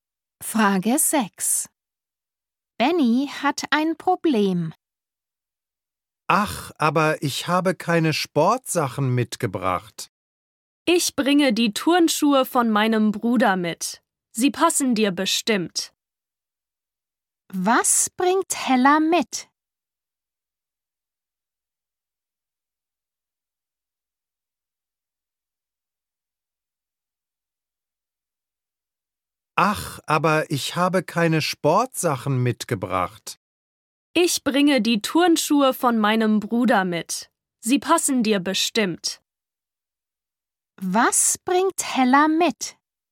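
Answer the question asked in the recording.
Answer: Die Turnschuhe von ihrem Bruder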